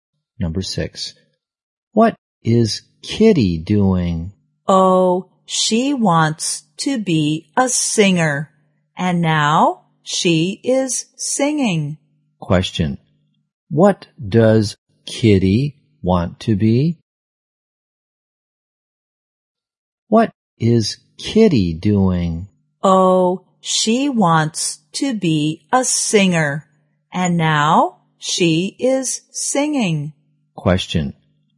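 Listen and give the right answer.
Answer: A singer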